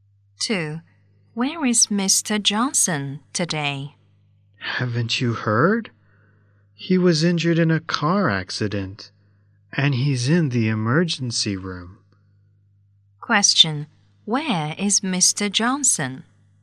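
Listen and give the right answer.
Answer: In the emergency room (hospital)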